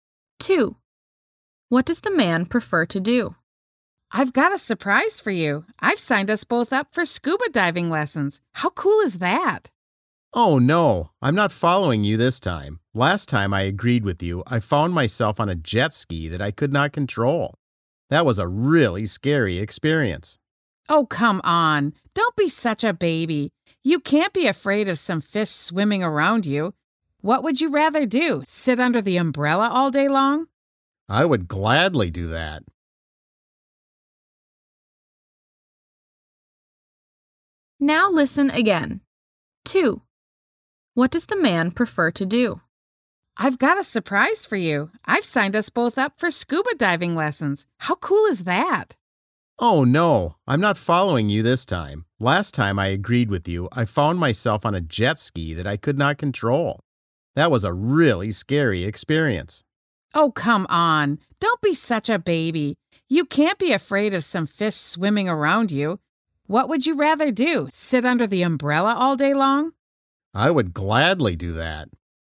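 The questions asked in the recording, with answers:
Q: What does the man prefer to do?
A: Sit under the umbrella all day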